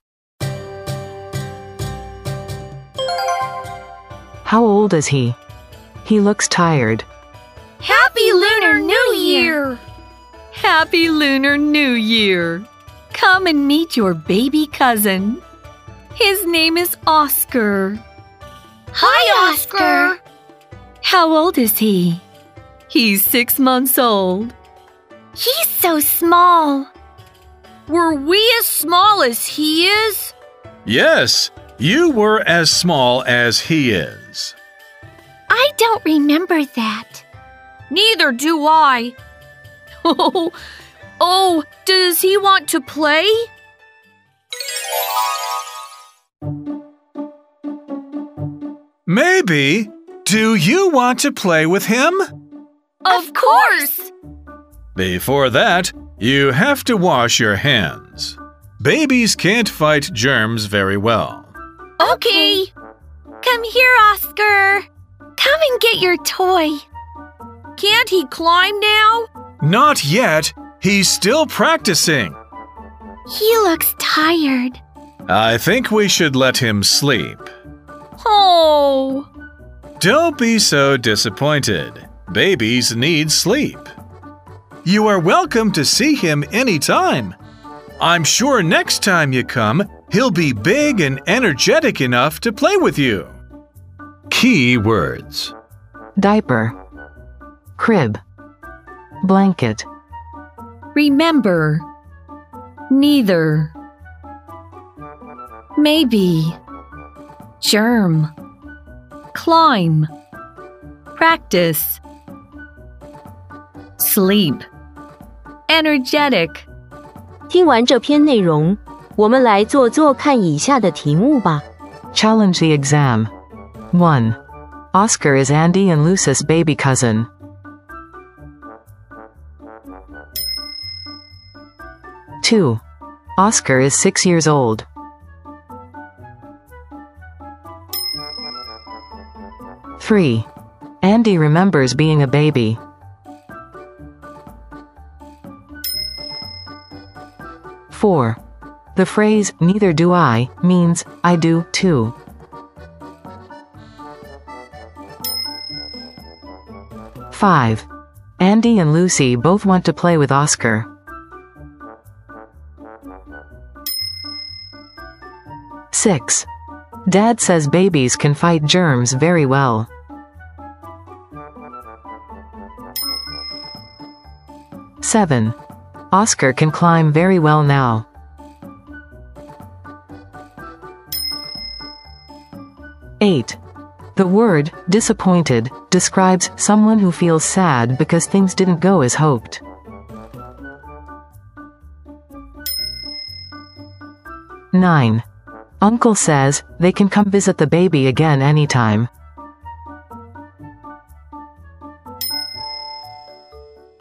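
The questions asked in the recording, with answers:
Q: Oscar is Andy and Lucy's baby cousin.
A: True

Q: Oscar is 6 years old.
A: False

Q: Andy remembers being a baby.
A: False

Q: The phrase, neither do I, means, I do, too.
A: False

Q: Andy and Lucy both want to play with Oscar.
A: True

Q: Dad says babies can fight germs very well.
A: False

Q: Oscar can climb very well now.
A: False

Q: The word, disappointed, describes someone who feels sad because things didn't go as hoped.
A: True

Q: Uncle says they can come visit the baby again anytime.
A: True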